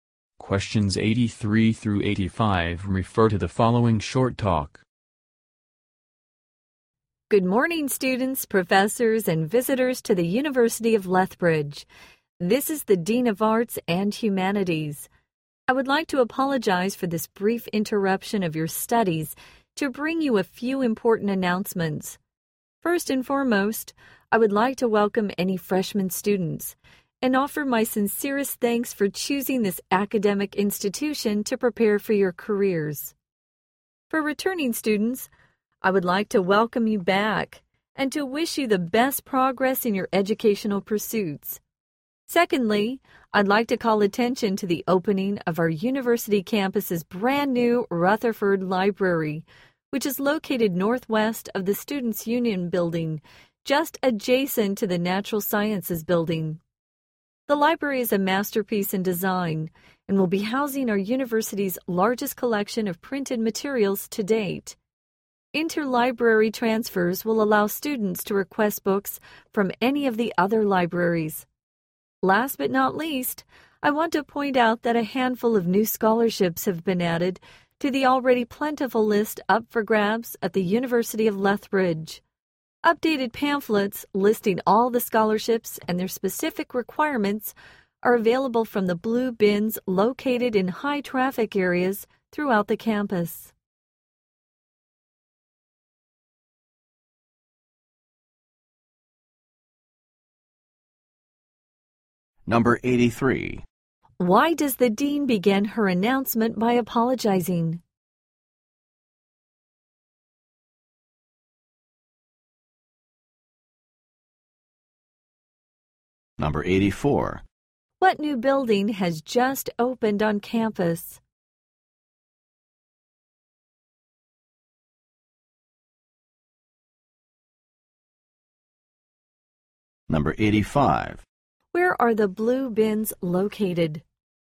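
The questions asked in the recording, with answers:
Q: Why does the dean begin her announcement by apologizing?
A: For interrupting their studies

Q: What new building has just opened on campus?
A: Rutherford Library

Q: Where are the blue bins located?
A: In high-traffic areas throughout the campus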